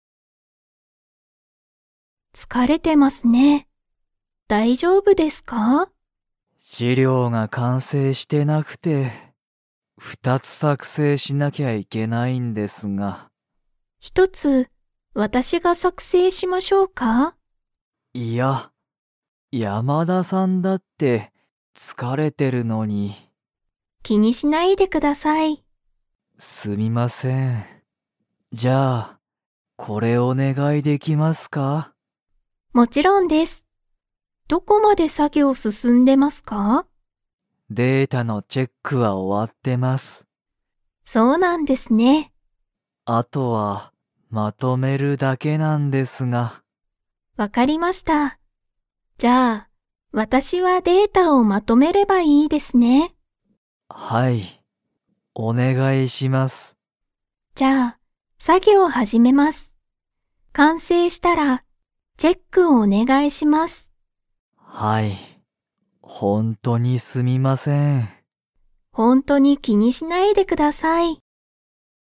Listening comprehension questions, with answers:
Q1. 山田やまださんは、鈴木すずきさんの資料しりょうを一ひとつ 。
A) 作成さくせいする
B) 作成さくせいしない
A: A) 作成さくせいする

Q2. データの は終おわっている。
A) 完成かんせい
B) 作業さぎょう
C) チェック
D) 作成さくせい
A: C) チェック

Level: Level 4

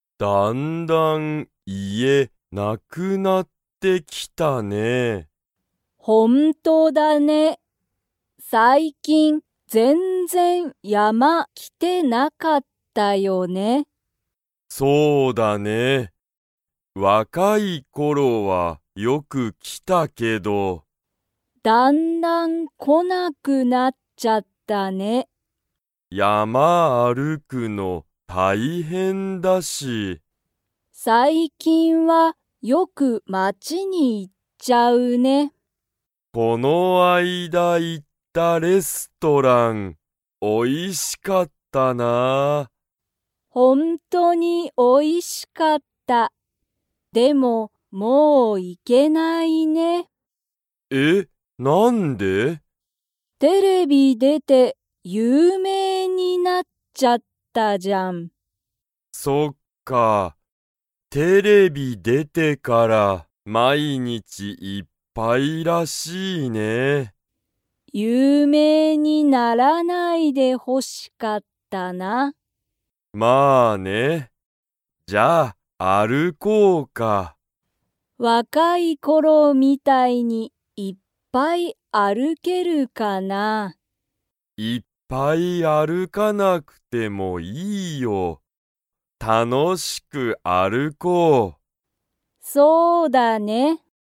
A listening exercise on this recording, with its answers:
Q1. ケンタとヨシミは、最近(さいきん)はよく____に行(い)く。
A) 山(やま)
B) テレビ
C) 家(いえ)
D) 街(まち)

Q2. この間行(あいだい)ったレストランは、おいしかったですか?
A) はい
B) いいえ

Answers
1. D) 街(まち)
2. A) はい

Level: Level 2

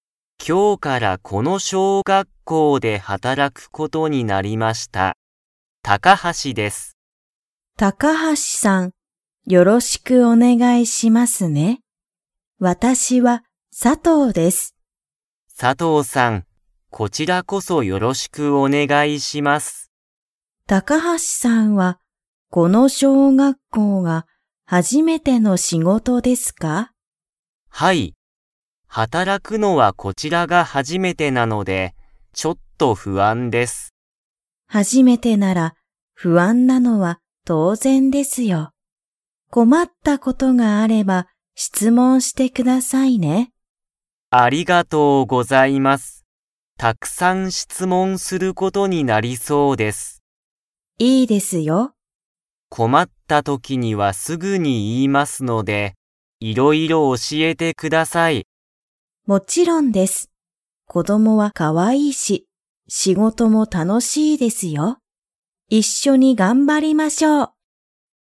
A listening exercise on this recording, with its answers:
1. 高橋たかはしさんは、この小学校しょうがっこうが の仕事しごとだ。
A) 初はじめて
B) 最後さいご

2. 佐藤さとうさんは、小学校しょうがっこうの仕事しごとは と思おもっている。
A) 不安ふあん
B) 難むずかしい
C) かわいい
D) 楽たのしい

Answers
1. A) 初はじめて
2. D) 楽たのしい

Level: Level 3

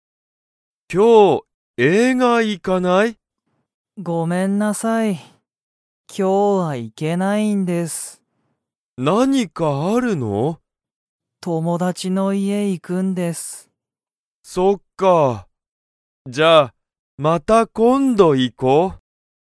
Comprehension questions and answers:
ヒロトとナオキは、今日きょう映画えいがに行いきますか?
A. はい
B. いいえ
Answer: B. いいえ

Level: Level 1

